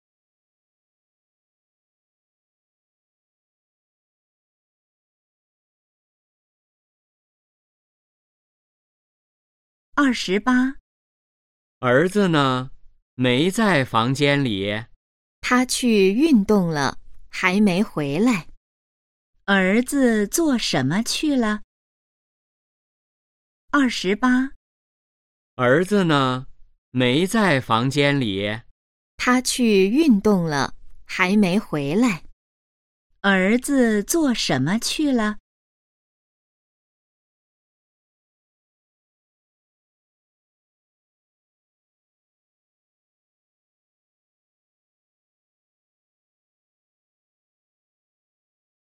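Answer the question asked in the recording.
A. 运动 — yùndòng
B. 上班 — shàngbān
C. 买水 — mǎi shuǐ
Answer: A. 运动 — yùndòng

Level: HSK2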